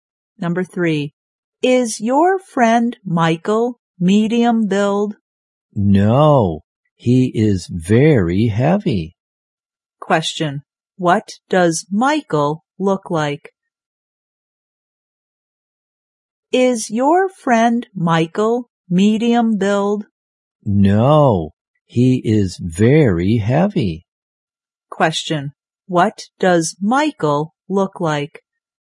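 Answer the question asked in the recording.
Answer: He is very heavy.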